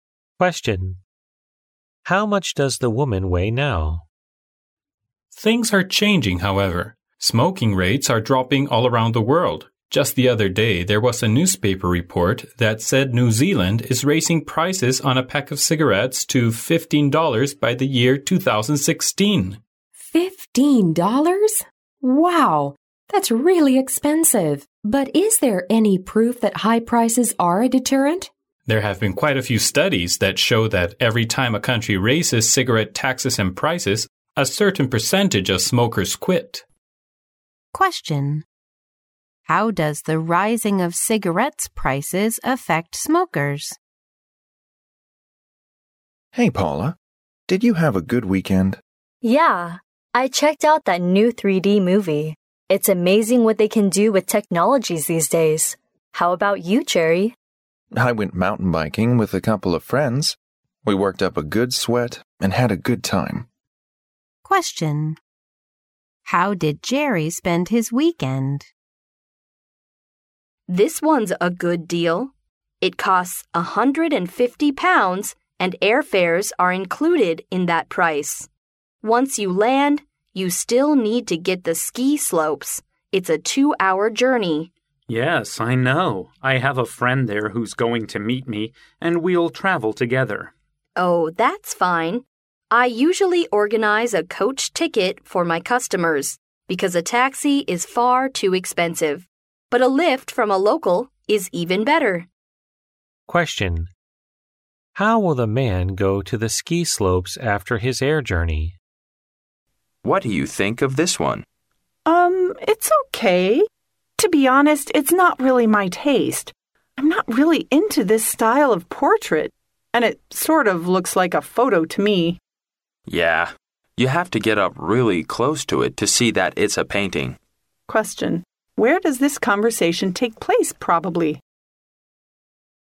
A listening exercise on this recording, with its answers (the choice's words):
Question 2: How does the rising of cigarettes prices affect smokers?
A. Smokers do not care about the raise.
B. Some smokers just stop smoking.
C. Lots of smokers protest against the raise.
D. Some smokers smoke more than before.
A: Some smokers just stop smoking.

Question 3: How did Jerry spend his weekend?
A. He watched a new 3D movie with Paula.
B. He experimented with some new technologies.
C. He went mountain biking with some friends.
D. He went shopping and bought a nice sweater.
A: He went mountain biking with some friends.

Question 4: How will the man go to the ski slopes after his air journey?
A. He will fly another short journey.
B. The travel agency booked him a coach ticket.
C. A friend will provide him with a lift.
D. The man would like to take a taxi.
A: A friend will provide him with a lift.

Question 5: Where does this conversation take place probably?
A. At the airport.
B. In an art gallery.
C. In a bookshop.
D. In a restaurant.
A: In an art gallery.

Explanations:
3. 对话中Paula反问Jerry周末过得怎么样时,Jerry回答说"I went mountain biking with a couple of friends",即他和朋友一起去骑山地车了。因此选C项。
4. 录音中说"I have a friend there who's going to meet me"可知他的朋友会载他一程。故选C项。
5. 对话中男士提到"Yeah, you have to get up really close to it to see that it's a painting. "话题与"画"有关,可以推测该段对话发生在画廊里,因此答案选B。

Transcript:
[听力原文] M: Things are changing, however. Smoking rates are dropping all around the world. Just the other day there was a newspaper report that said New Zealand is raising prices on a pack of cigarettes to $15 by the year 2016! W: $15!? Wow! That's really expensive. But is there any proof that high prices are a deterrent?
[解析] 录音中男士提到"There have been quite a few studies that show that every time a country raises cigarette taxes and prices, a certain percentage of smokers quit"。
[听力原文] M: Hey, Paula. Did you have a good weekend? W: Yeah ... I checked out that new 3D movie. It's amazing what they can do with technologies these days! How about you, Jerry? M: I went mountain biking with a couple of friends. We worked up a good sweat and had a good time.
[听力原文] W: This one's a good deal. It costs £150 and airfares are included in that price. Once you land, you still need to get the ski slopes. It's a two-hour journey. M: Yes, I know, I have a friend there who's going to meet me and we'll travel together. W: Oh, that's fine, I usually organize a coach ticket for my customers, because a taxi is far too expensive. But a lift from a local is even better.
[听力原文] M: What do you think of this one? To be honest, it's not really my taste. I'm not really into this style of portrait. And it sort of looks like a photo to me.
[解析] 对话中男士提到"Yeah, you have to get up really close to it to see that it's a painting.